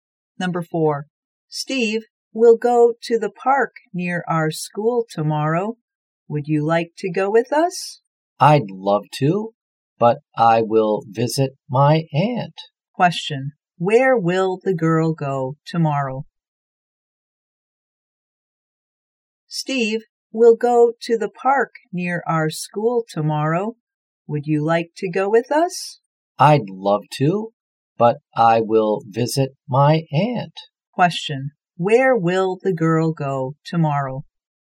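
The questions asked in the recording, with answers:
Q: Where will the girl go tomorrow?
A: To the park near their school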